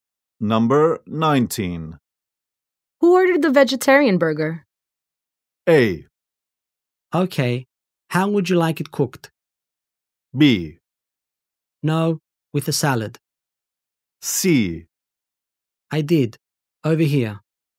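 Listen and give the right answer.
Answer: C: I did, over here.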